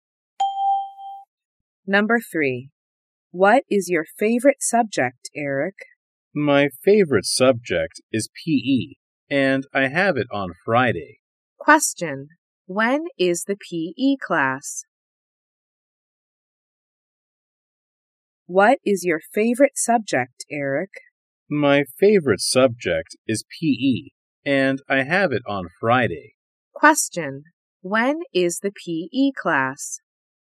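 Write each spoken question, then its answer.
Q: When is the PE class?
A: On Friday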